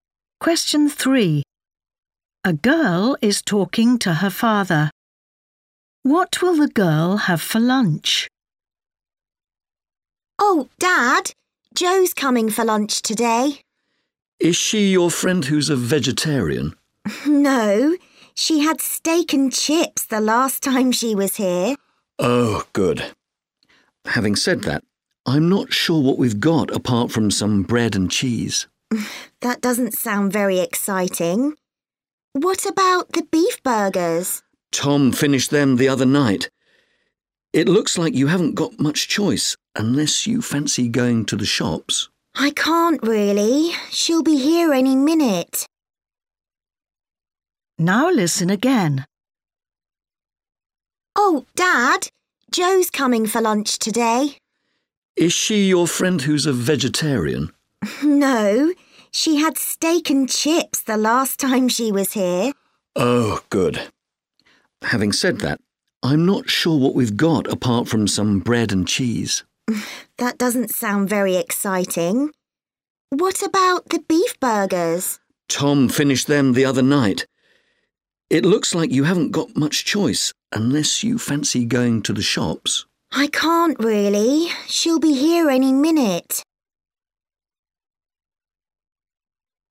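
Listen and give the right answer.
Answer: bread and cheese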